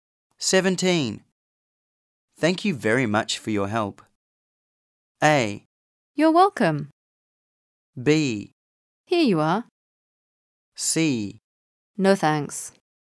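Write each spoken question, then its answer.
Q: Thank you very much for your help.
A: A: You're welcome.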